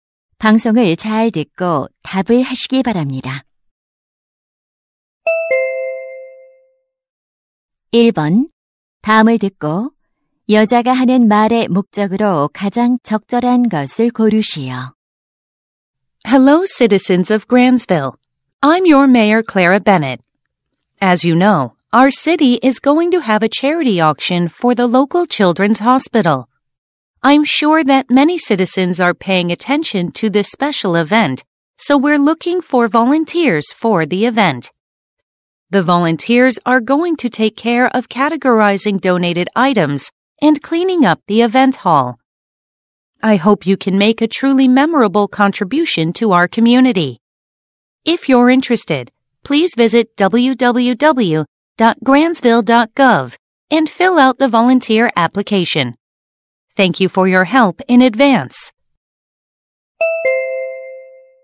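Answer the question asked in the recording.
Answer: 자선 경매 행사 자원봉사자 모집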